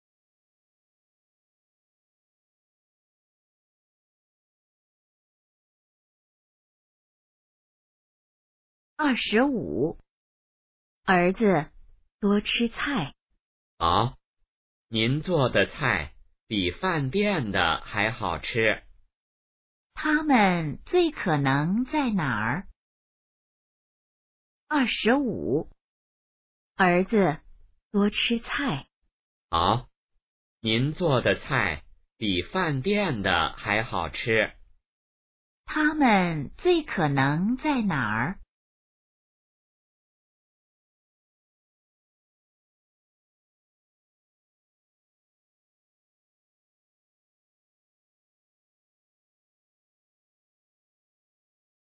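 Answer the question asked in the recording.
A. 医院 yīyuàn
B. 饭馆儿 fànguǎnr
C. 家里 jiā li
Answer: C. 家里 jiā li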